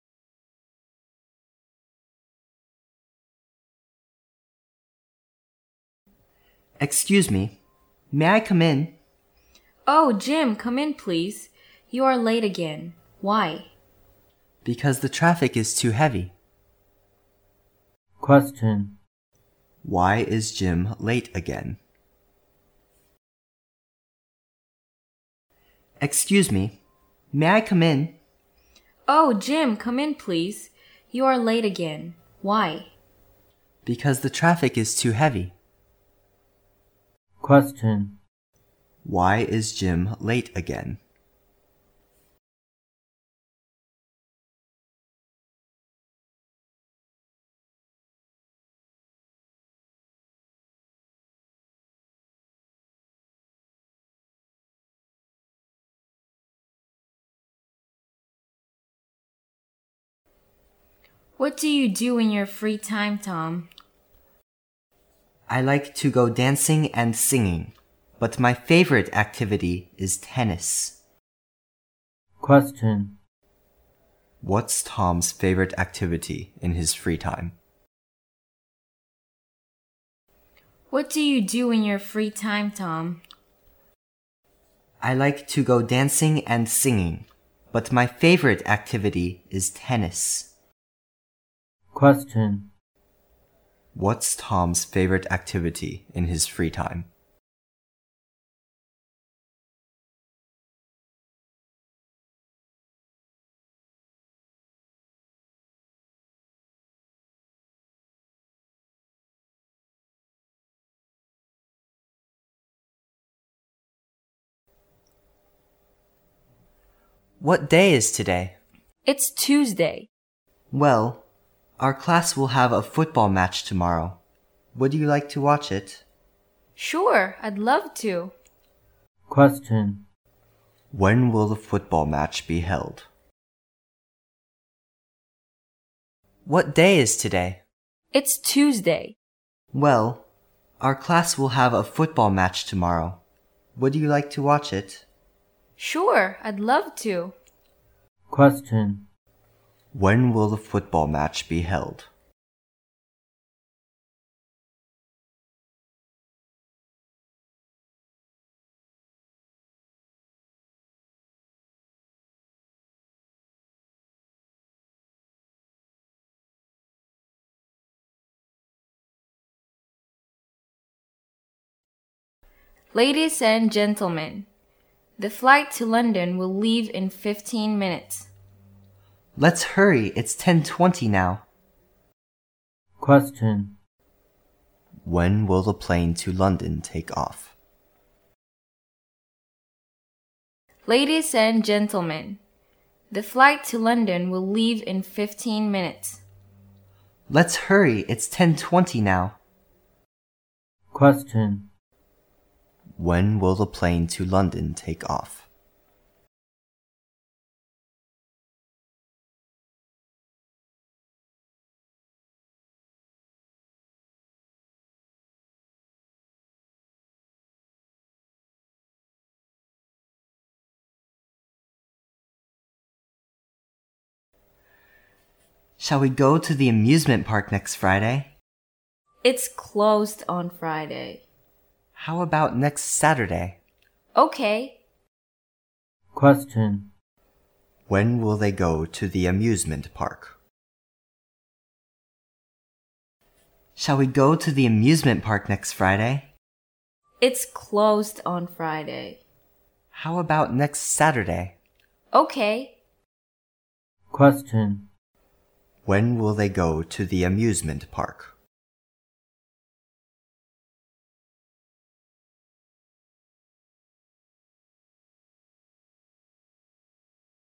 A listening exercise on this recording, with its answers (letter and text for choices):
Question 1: Why is Jim late again?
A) His bike is broken on his way to school.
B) The traffic is too heavy.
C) He gets up late in the morning.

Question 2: What's Tom's favorite activity in his free time?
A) Dancing.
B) Singing.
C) Tennis.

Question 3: When will the football match be held?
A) On Monday.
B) On Tuesday.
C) On Wednesday.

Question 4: When will the plane to London take off?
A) 10:35.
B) 10:20.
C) 10:05.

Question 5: When will they go to the amusement park?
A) Next Sunday.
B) Next Friday.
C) Next Saturday.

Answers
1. B) The traffic is too heavy.
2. C) Tennis.
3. C) On Wednesday.
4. A) 10:35.
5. C) Next Saturday.

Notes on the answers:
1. 从对话中男士的回答:Because the traffic is too heavy. 可知,吉姆之所以迟到是因为堵车,故选B。
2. 从对话中男士的回答:I like to go dancing and singing, but my favorite activity is tennis. 可知,汤姆最喜欢的运动是网球,故选C。
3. 从对话中可知,今天是星期二。男士说:我们班明天将有场足球比赛。明天就是星期三,所以足球比赛将在星期三举行,故选C。
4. 飞往伦敦的飞机将于15分钟后起飞,而现在是10点20分,所以飞机将于10点35分起飞,故选A。
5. 男士说:我们下周五去游乐园吧! 女士回答:星期五游乐园关门。男士又建议下周六去,女士同意了,所以他们下周六将去游乐园,故选C。

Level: 公共英语一级(B)